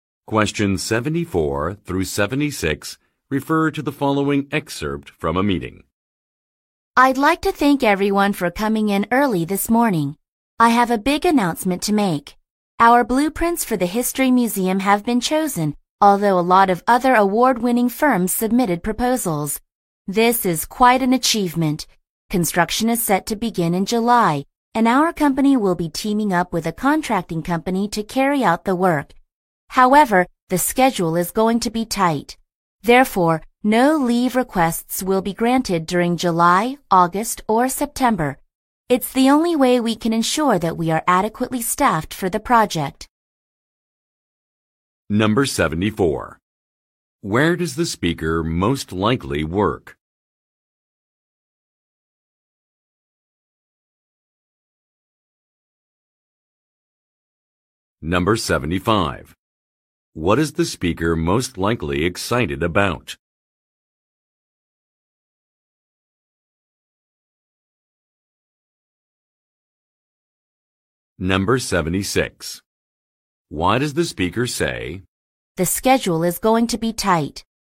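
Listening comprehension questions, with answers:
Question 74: Where does the speaker most likely work?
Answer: At an architectural firm

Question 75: What is the speaker most likely excited about?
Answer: Getting selected for a job

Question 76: Why does the speaker say, "the schedule is going to be tight"?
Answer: To provide a reason for a temporary policy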